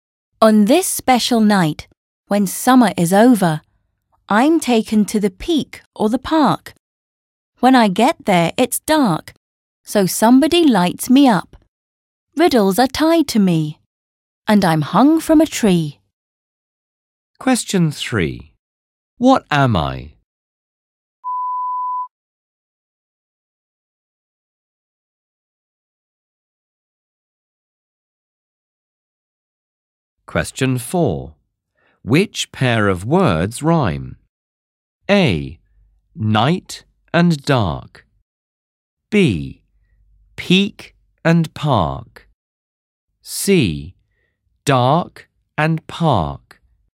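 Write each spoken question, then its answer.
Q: What am I?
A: a lantern

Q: Which pair of words rhyme?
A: C: Dark and park.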